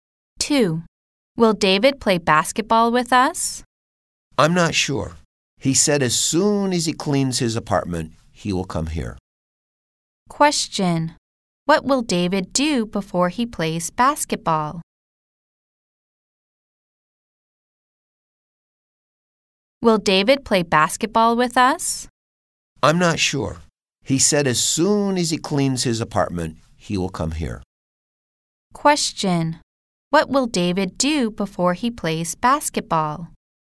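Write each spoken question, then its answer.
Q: Question. What will David do before he plays basketball?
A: He will clean his apartment.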